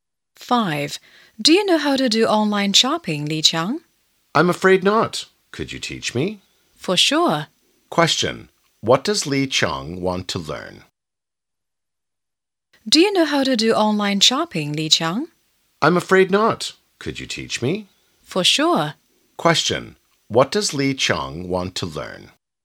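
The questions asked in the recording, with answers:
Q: What does Li Qiang want to learn?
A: How to do online shopping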